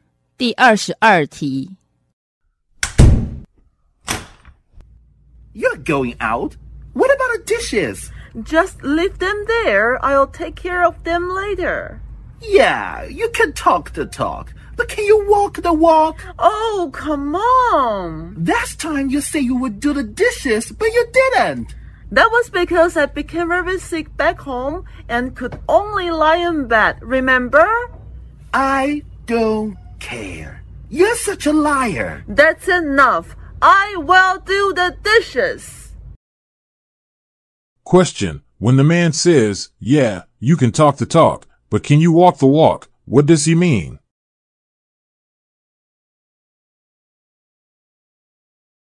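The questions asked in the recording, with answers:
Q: When the man says, yeah, you can talk the talk, but can you walk the walk, what does he mean?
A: He doubts she will actually do what she says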